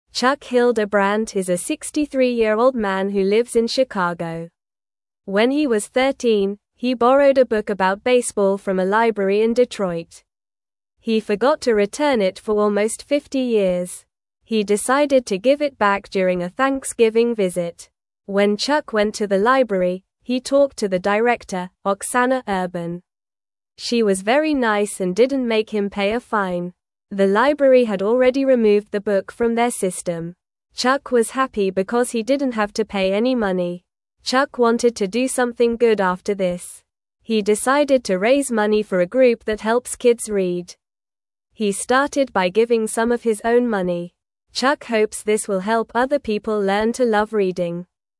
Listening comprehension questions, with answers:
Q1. When (1)______ went to the (2)______, he talked to the director, Oksana Urban.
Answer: Chuck

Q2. When (1)______ went to the (2)______, he talked to the director, Oksana Urban.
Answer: library

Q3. The library had already removed the book from their (3)______.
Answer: system

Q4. Chuck was (4)______ because he didn't have to pay any money.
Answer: happy

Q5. He decided to raise money for a (5)______ that (6)______ kids read.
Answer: group

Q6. He decided to raise money for a (5)______ that (6)______ kids read.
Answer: helps

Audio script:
Chuck Hildebrandt is a 63-year-old man who lives in Chicago. When he was 13, he borrowed a book about baseball from a library in Detroit. He forgot to return it for almost 50 years! He decided to give it back during a Thanksgiving visit.
When Chuck went to the library, he talked to the director, Oksana Urban. She was very nice and didn't make him pay a fine. The library had already removed the book from their system. Chuck was happy because he didn't have to pay any money.
Chuck wanted to do something good after this. He decided to raise money for a group that helps kids read. He started by giving some of his own money. Chuck hopes this will help other people learn to love reading.

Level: Level 2